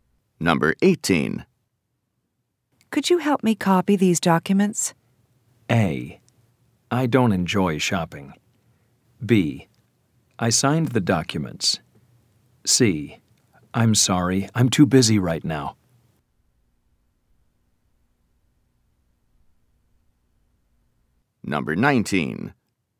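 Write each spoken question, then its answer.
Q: Could you help me copy these documents?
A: C: I'm sorry, I'm too busy right now.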